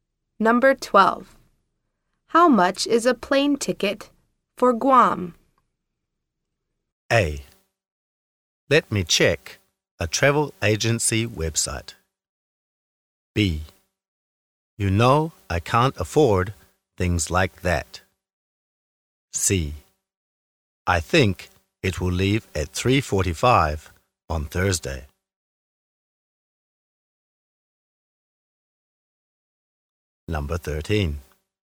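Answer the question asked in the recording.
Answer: A: Let me check a travel agency website.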